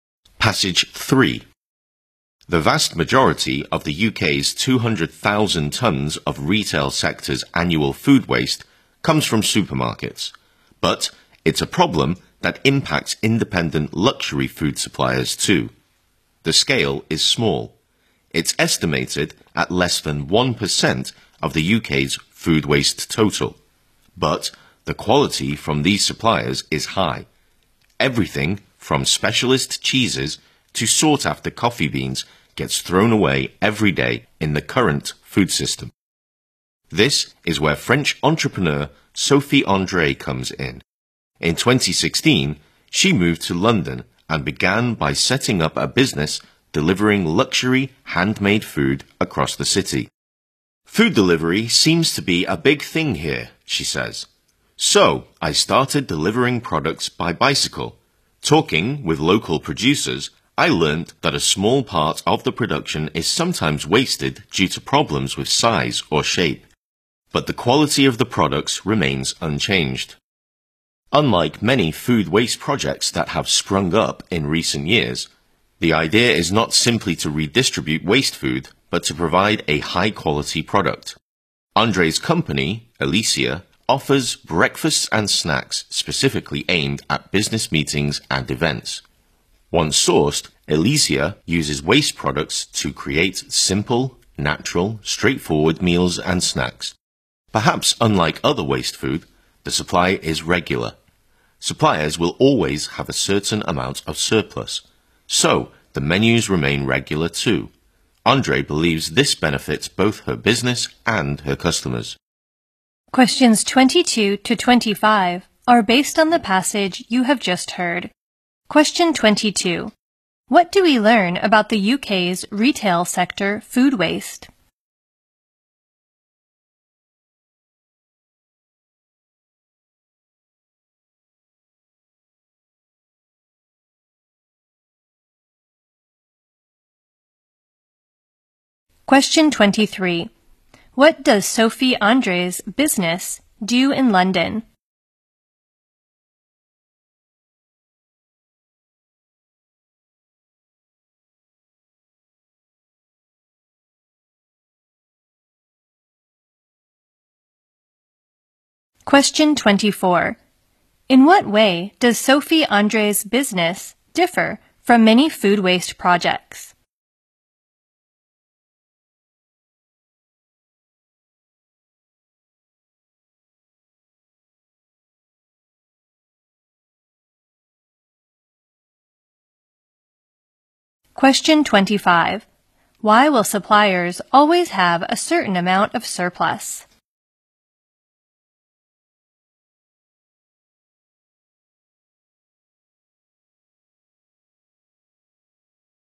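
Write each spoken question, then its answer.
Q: What do we learn about the UK's retail sector food waste?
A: Most of it comes from supermarkets

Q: What does Sophie André's business do in London?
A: Delivers luxury handmade food / breakfasts and snacks for business meetings made from waste products

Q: In what way does Sophie André's business differ from many food waste projects?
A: It provides a high-quality product rather than simply redistributing waste food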